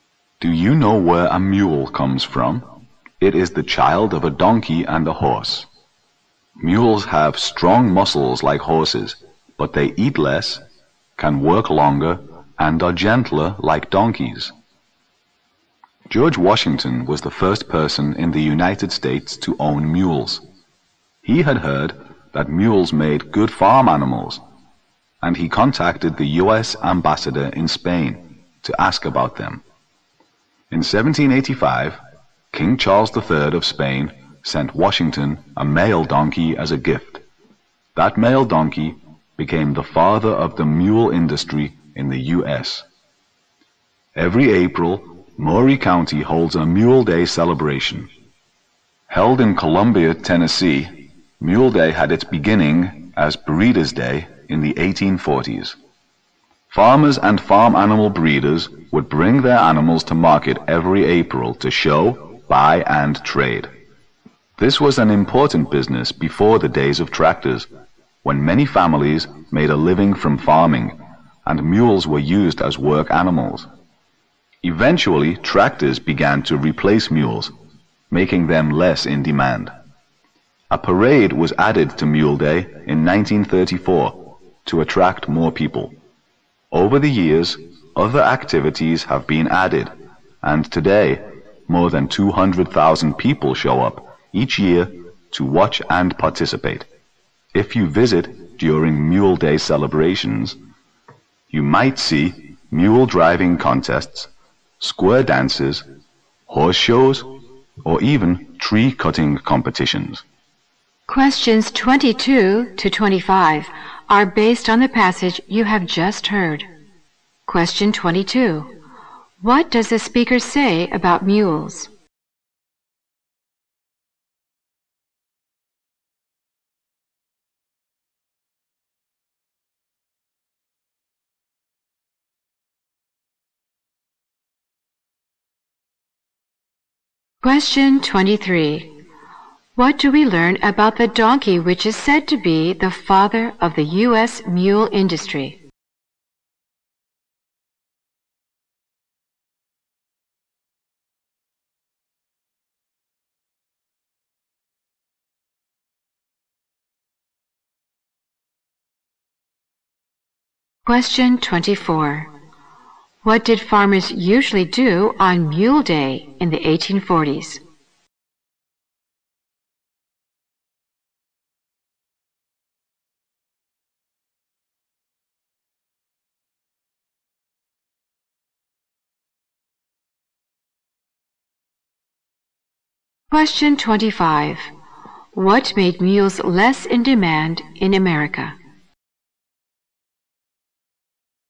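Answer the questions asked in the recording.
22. They are strong like horses but eat less, work longer and are gentler like donkeys.
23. It was a gift from King Charles III of Spain to George Washington in 1785.
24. They brought their animals to market to show, buy and trade.
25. Tractors replaced them.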